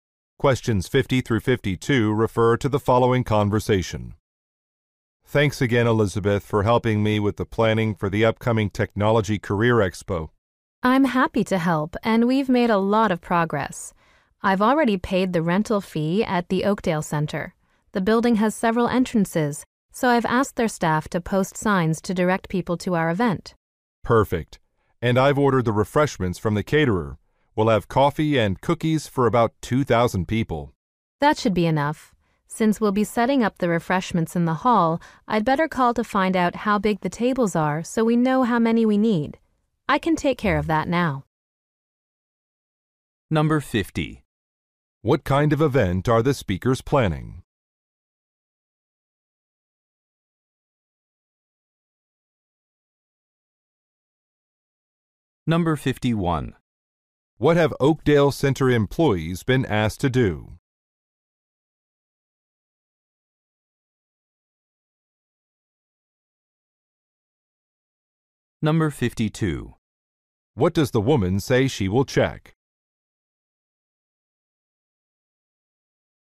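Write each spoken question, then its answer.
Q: What kind of event are the speakers planning?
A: A technology career expo

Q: What have Oakdale Center employees been asked to do?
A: Post signs directing people to the event

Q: What does the woman say she will check?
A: The size of the tables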